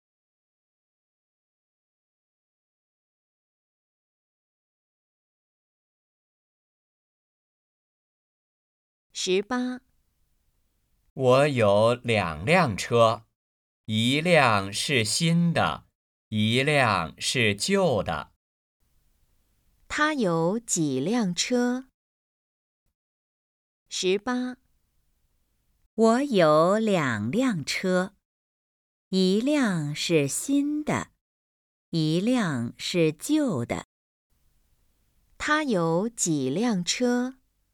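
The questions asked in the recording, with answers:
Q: 他有几辆车?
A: 2辆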